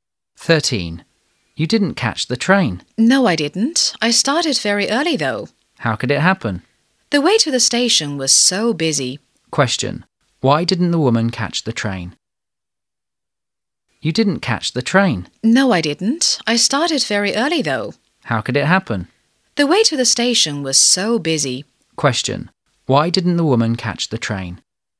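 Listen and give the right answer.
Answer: The way to the station was very busy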